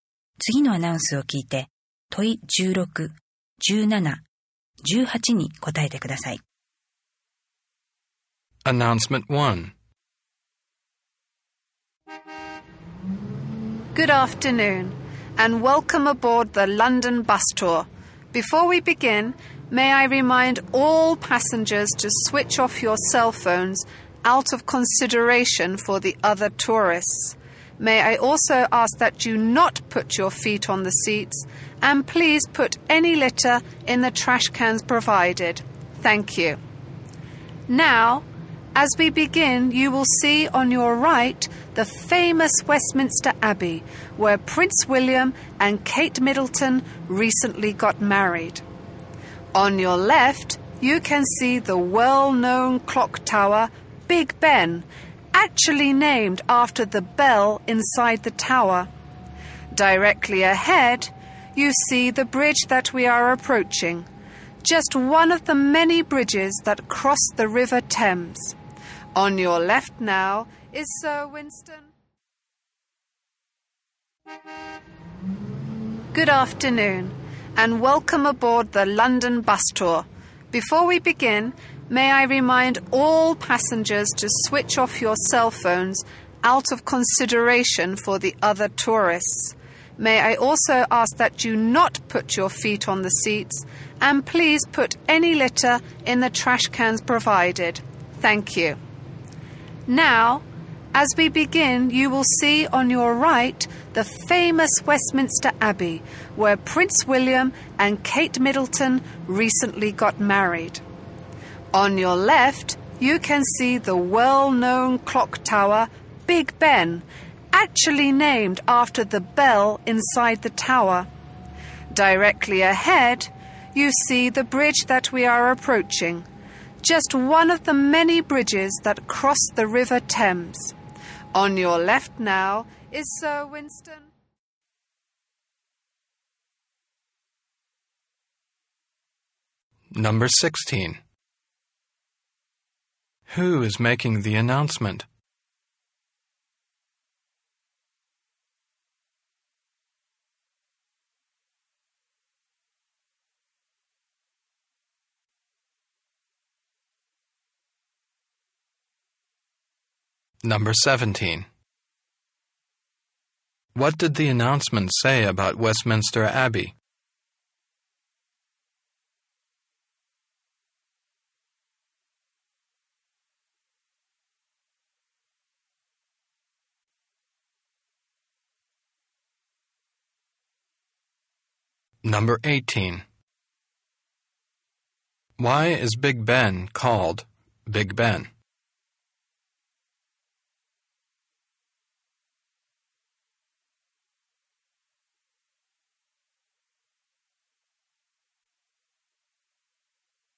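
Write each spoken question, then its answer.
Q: Who is making the announcement?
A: A London bus tour guide

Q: What did the announcement say about Westminster Abbey?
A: Prince William and Kate Middleton recently got married there

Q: Why is Big Ben called Big Ben?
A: It is named after the bell inside the tower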